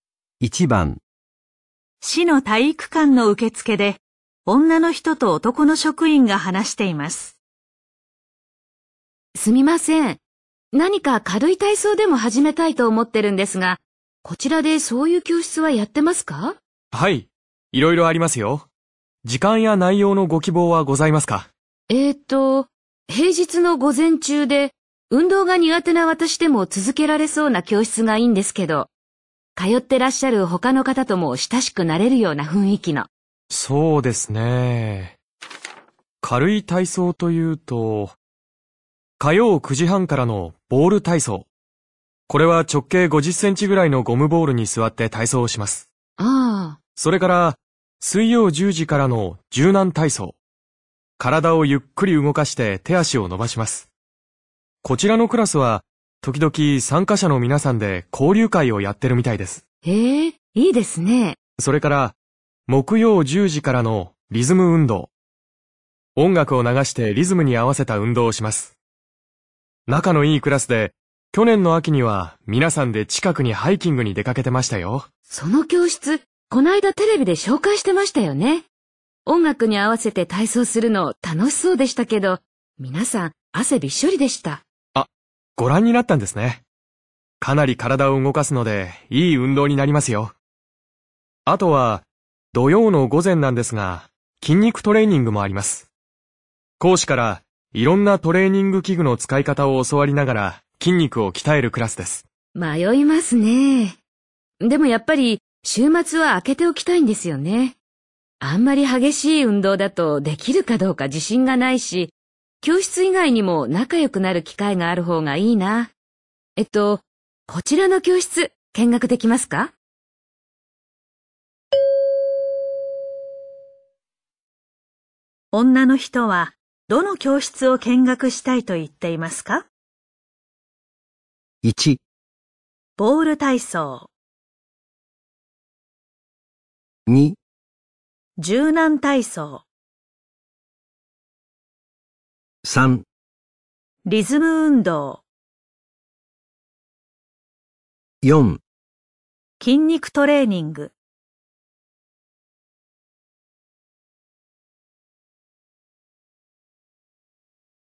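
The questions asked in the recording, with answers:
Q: 女の人はどの教室を見学したいと言っていますか?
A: 2: 柔軟体操。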